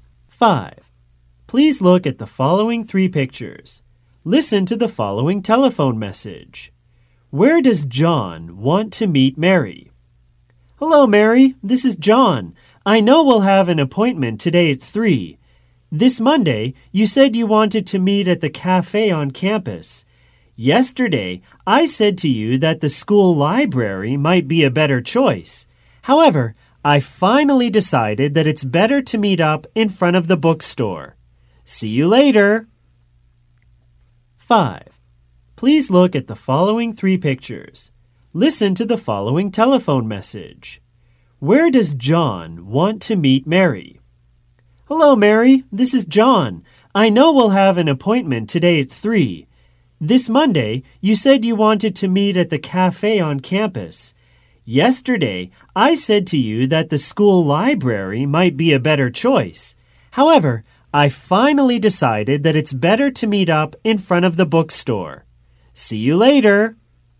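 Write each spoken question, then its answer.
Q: Where does John want to meet Mary?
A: In front of the bookstore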